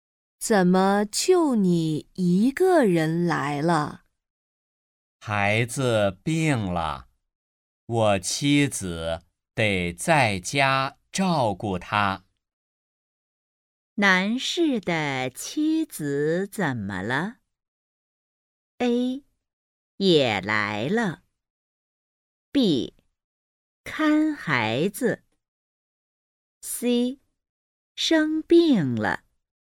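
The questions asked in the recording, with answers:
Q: 男士的妻子怎么了?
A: B: 看孩子。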